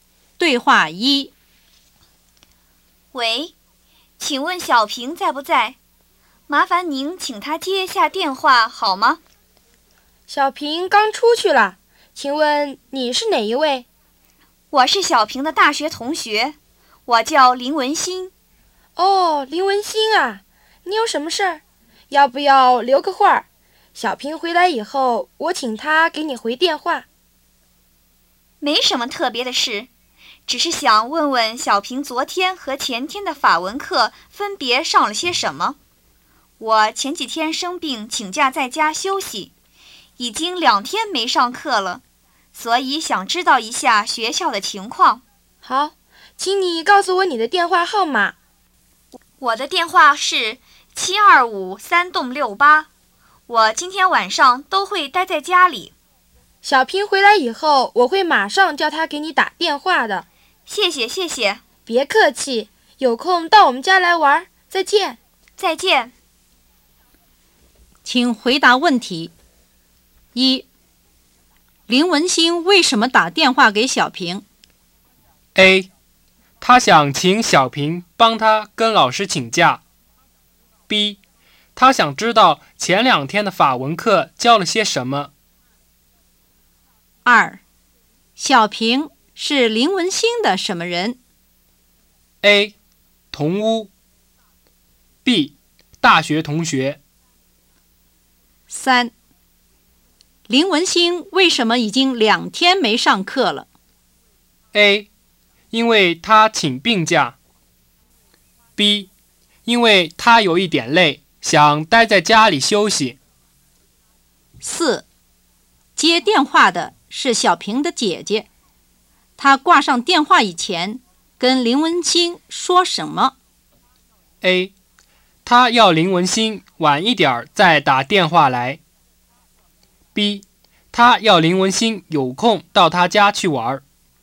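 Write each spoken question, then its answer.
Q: 林文星为什么打电话给小平?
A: B: 他想知道前两天的法文课教了些什么。

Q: 小平是林文星的什么人?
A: B: 大学同学。

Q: 林文星为什么已经两天没上课了?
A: A: 因为他请病假。

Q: 接电话的是小平的姐姐,她挂上电话以前跟林文星说什么?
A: B: 他要林文星有空到他家去玩。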